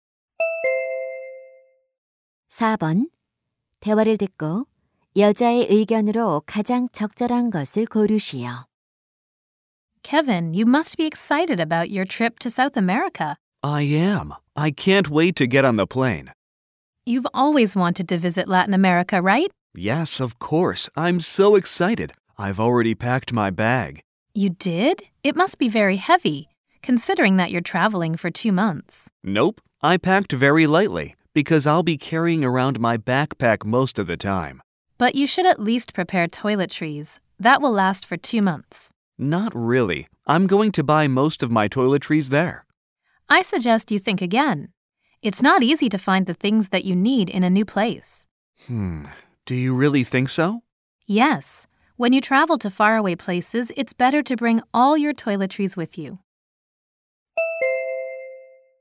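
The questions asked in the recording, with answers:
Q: 대화를 듣고 여자의 의견으로 가장 적절한 것을 고르시오.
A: 먼 곳으로 여행할 때는 세면도구를 모두 챙겨 가는 것이 좋다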